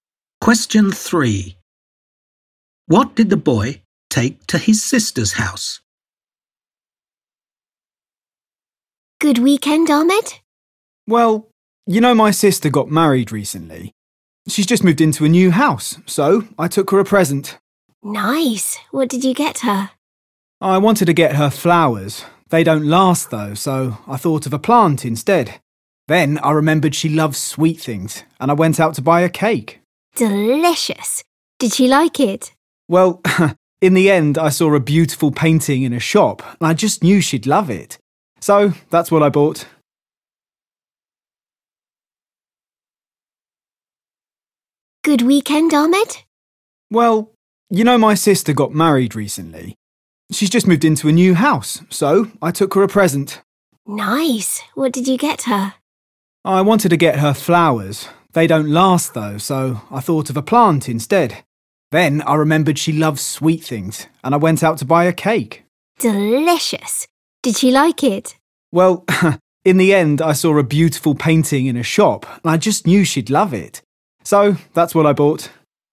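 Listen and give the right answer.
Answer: a painting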